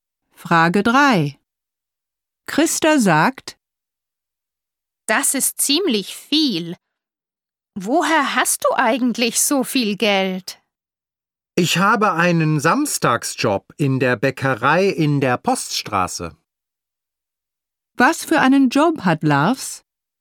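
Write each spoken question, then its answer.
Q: Was für einen Job hat Lars?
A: Einen Samstagsjob in der Bäckerei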